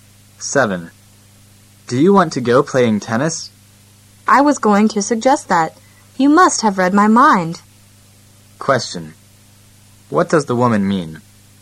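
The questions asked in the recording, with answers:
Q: What does the woman mean?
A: She also wants to play tennis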